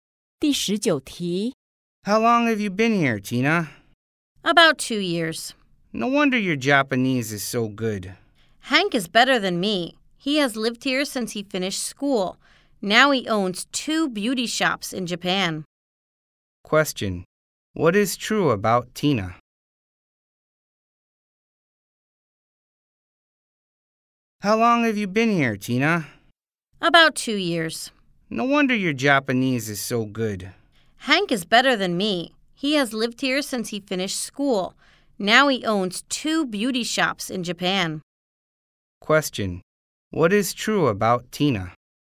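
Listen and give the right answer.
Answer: She has lived in Japan for about 2 years and speaks good Japanese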